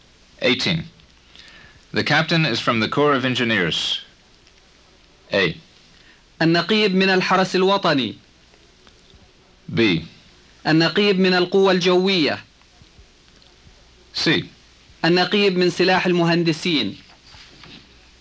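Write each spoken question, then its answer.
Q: The captain is from the Corps of Engineers.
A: C: النقيب من سلاح المهندسين.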